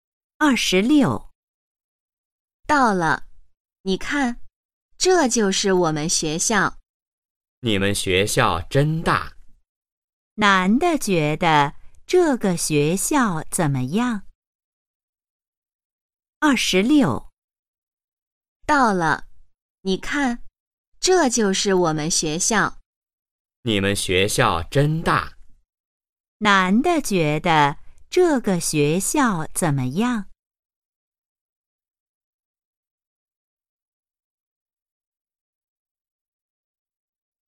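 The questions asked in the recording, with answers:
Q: 男的觉得这个学校怎么样?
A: 很大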